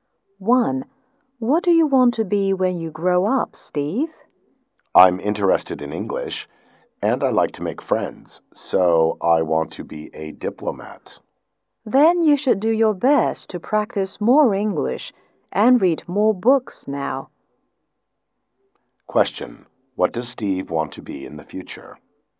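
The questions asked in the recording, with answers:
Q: What does Steve want to be in the future?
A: A diplomat.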